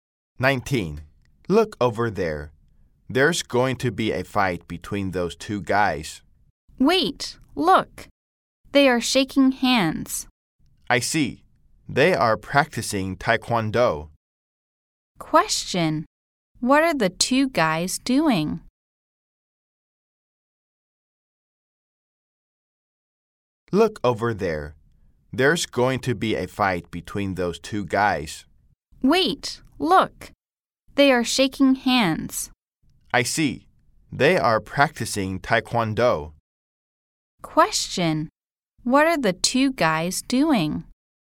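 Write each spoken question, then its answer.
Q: What are the 2 guys doing?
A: Practicing taekwondo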